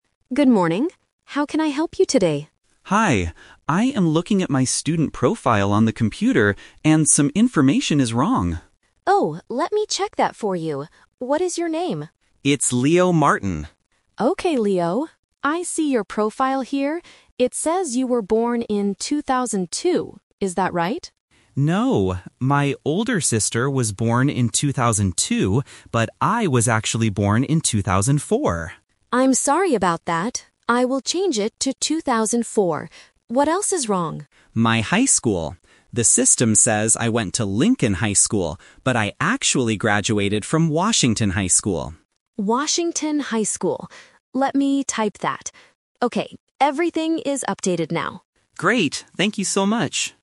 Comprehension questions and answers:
Listen to a student talking to an office staff member. For each question, choose the correct answer (A, B, or C).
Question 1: What year was Leo born?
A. In 2002.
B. In 2004.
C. In 2006.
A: B. In 2004.

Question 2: Who was born in 2002?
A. Leo.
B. Leo's older sister.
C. Leo's brother.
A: B. Leo's older sister.

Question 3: Which high school did Leo actually go to?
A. Lincoln High School.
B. Washington High School.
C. Jefferson High School.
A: B. Washington High School.

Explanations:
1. Leo corrects the staff member by saying, "...but I was actually born in 2004." Why the traps are wrong: Option A is a "Twist Trap". The system says 2002, but that is wrong (it's his sister's birth year). Option C is not mentioned.
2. Leo explicitly states, "My older sister was born in 2002..." Why the traps are wrong: Option A is a trap because 2002 was on Leo's profile, but it was a mistake. Option C is not mentioned.
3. Leo tells the staff his real school: "...but I actually graduated from Washington High School." Why the traps are wrong: Option A is the trap. The computer system showed Lincoln High School, but that information was incorrect. Option C is not mentioned in the audio.

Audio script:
Staff: Good morning. How can I help you today?
Leo: Hi. I am looking at my student profile on the computer, and some information is wrong.
Staff: Oh, let me check that for you. What is your name?
Leo: It's Leo Martin.
Staff: Okay, Leo. I see your profile here. It says you were born in 2002. Is that right?
Leo: No. My older sister was born in 2002, but I was actually born in 2004.
Staff: I'm sorry about that. I will change it to 2004. What else is wrong?
Leo: My high school. The system says I went to Lincoln High School, but I actually graduated from Washington High School.
Staff: Washington High School. Let me type that... Okay, everything is updated now.

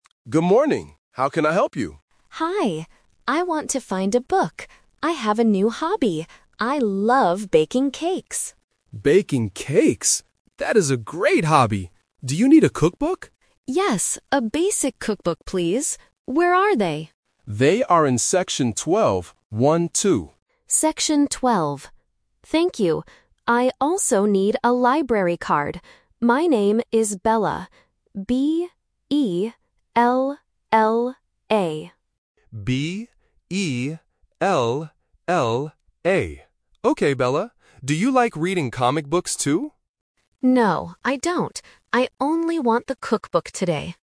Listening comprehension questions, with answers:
Listen to the conversation in a library. Choose the correct answer (A, B, or C) for each question.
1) What is the reader's new hobby?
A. Reading comic books.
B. Baking cakes.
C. Cooking dinner.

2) Where are the cookbooks?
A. Section 12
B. Section 20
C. Section 2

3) How do you spell the reader's name?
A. P-E-L-L-A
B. B-E-L-A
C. B-E-L-L-A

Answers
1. B. Baking cakes.
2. A. Section 12
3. C. B-E-L-L-A

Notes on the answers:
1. The reader clearly says, "I have a new hobby. I love baking cakes." Option (A) "Reading comic books" is a trap; the librarian asks about it at the end, but the reader says, "No, I don't." Option (C) "Cooking dinner" is not mentioned.
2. The librarian says the books are in "section twelve" and repeats "One-two" to be clear. Option (B) "Section 20" (twenty) is a classic phonetic trap for the number 12. Option (C) "Section 2" sounds similar but is incorrect.
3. The reader spells her name letter by letter: "B-E-L-L-A". Option (A) uses a 'P' instead of a 'B', testing the difference between the /p/ and /b/ sounds. Option (B) misses the double 'L'.

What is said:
Librarian: Good morning. How can I help you?
Reader: Hi. I want to find a book. I have a new hobby. I love baking cakes.
Librarian: Baking cakes. That is a great hobby! Do you need a cookbook?
Reader: Yes, a basic cookbook, please. Where are they?
Thank you. I also need a library card. My name is Bella.
Librarian: B-E-L-L-A. Okay, Bella. Do you like reading comic books too?

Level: A1

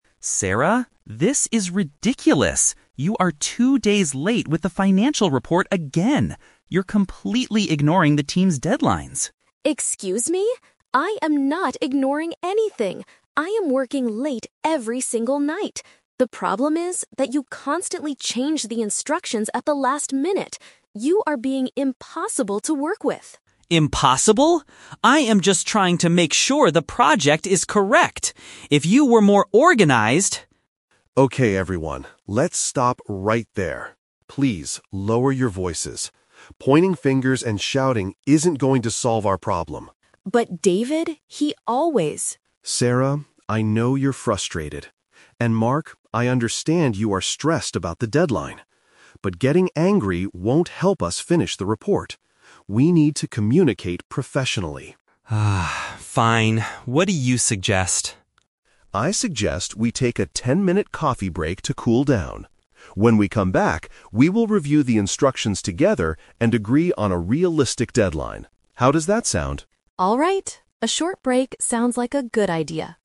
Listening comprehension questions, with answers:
Listen to a conversation between three colleagues in a meeting. For each question, choose the correct answer A, B, or (C).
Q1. What is the MAIN reason Mark is angry with Sarah?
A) She refuses to work late in the evenings.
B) She has not finished her work on time.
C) She lost the financial report instructions.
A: B) She has not finished her work on time.

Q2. How does David view the argument between Mark and Sarah?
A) He thinks they are both being extremely lazy.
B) He agrees with Mark that Sarah is disorganized.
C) He believes they need to speak more respectfully to each other.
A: C) He believes they need to speak more respectfully to each other.

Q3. What does David tell them to do FIRST?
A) Step away from the meeting for a short time to relax.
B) Write down a list of new project instructions immediately.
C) Apologize to the rest of the team for shouting.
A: A) Step away from the meeting for a short time to relax.

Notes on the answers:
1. Mark complains that Sarah is "two days late with the financial report" and is ignoring "deadlines." Not finishing work on time is a direct paraphrase for missing a deadline.
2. David tells them to "lower your voices" and says they need to "communicate professionally." Speaking respectfully is a B1-level synonym for communicating professionally and not shouting.
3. David suggests they "take a ten-minute coffee break to cool down." Stepping away for a short time to relax perfectly paraphrases taking a quick break to cool down.

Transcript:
Mark: Sarah, this is ridiculous! You are two days late with the financial report again. You're completely ignoring the team's deadlines.
Sarah: Excuse me? I am not ignoring anything! I am working late every single night. The problem is that you constantly change the instructions at the last minute. You are being impossible to work with!
I am just trying to make sure the project is correct! If you were more organized...
David: Okay, everyone, let's stop right there. Please, lower your voices. Pointing fingers and shouting isn't going to solve our problem.
Sarah: But David, he always...
David: Sarah, I know you're frustrated, and Mark, I understand you are stressed about the deadline. But getting angry won't help us finish the report. We need to communicate professionally.
Mark: (Sighs) Fine. What do you suggest?
David: I suggest we take a ten-minute coffee break to cool down. When we come back, we will review the instructions together and agree on a realistic deadline. How does that sound?

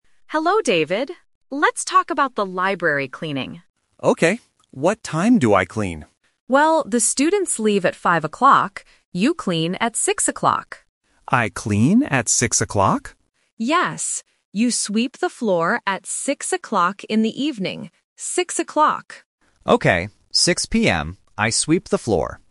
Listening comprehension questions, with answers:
Listen to the conversation and choose the correct answer (A, B, or C).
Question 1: What time do the students leave?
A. 4:00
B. 5:00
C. 6:00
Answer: B. 5:00

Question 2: What time does David clean the library?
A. 5:00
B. 6:00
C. 7:00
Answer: B. 6:00

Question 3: What does David do at 6:00?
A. He reads a book.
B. He sweeps the floor.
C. He leaves the library.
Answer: B. He sweeps the floor.

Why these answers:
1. The Key: The librarian clearly says, "the students leave at 5:00." The Trap (C): 6:00 is mentioned multiple times, but it is the time David cleans, not the time the students leave. (A) is a plausible time, but it is not mentioned in the audio.
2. The Key: The librarian says, "You clean at 6:00," and David repeats, "I clean at 6:00?". The librarian confirms with "Six o'clock." The Trap (A): 5:00 is mentioned, but it is the time the students leave. (C) is a plausible evening time, but it is not mentioned.
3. The Key: The librarian tells David, "You sweep the floor at 6:00," and David confirms, "I sweep the floor." The Trap (C): "Leaves" is mentioned in the audio ("the students leave"), but David does not leave at 6:00; he starts cleaning. (A) is a plausible activity in a library, but it is not David's job.

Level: A1

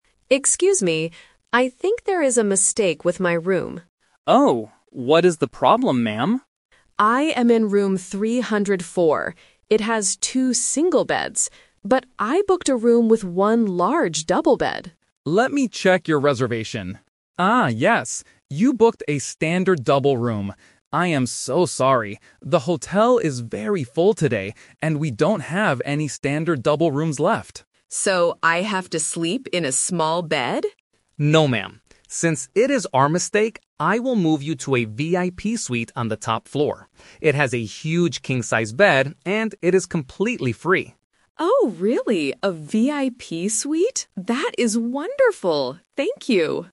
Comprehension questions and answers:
Listen to a conversation between a hotel guest and a receptionist. Choose the correct answer (A, B, or C) for each question.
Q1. What is the problem with room 304?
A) It is too small.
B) It has two single beds.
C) The bed is broken.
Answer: B) It has two single beds.

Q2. What kind of room did the guest book?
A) A VIP suite.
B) A single room.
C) A standard double room.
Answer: C) A standard double room.

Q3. How does the receptionist solve the problem? (The Twist)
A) He gives the guest a better room for free.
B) He puts the two single beds together.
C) He gives the guest her money back.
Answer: A) He gives the guest a better room for free.

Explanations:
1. The guest clearly states the problem: "It has two single beds."
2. The receptionist confirms her booking: "Ah, yes. You booked a standard double room."
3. This is the Twist. Since the hotel is full, he changes the plan and offers an upgrade: "I will move you to a VIP suite... and it is completely free."

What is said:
Guest: Excuse me. I think there is a mistake with my room.
Receptionist: Oh? What is the problem, ma'am?
Guest: I am in room 304. But I booked a room with one large double bed.
Receptionist: Let me check your reservation. Ah, yes. You booked a standard double room. I am so sorry. The hotel is very full today, and we don't have any standard double rooms left.
Guest: So, I have to sleep in a small bed?
Receptionist: No, ma'am. Since it is our mistake, I will move you to a VIP suite on the top floor. It has a huge King-size bed, and it is completely free.
Guest: Oh, really? A VIP suite? That is wonderful! Thank you.

